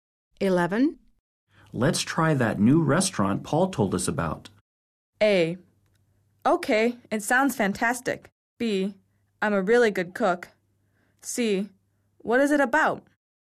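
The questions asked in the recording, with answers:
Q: Let's try that new restaurant Paul told us about.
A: A: Okay, it sounds fantastic.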